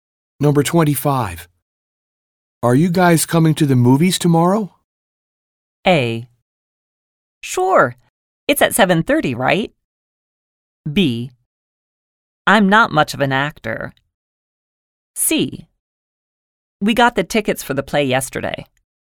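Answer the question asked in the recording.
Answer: A: Sure. It's at 7:30, right?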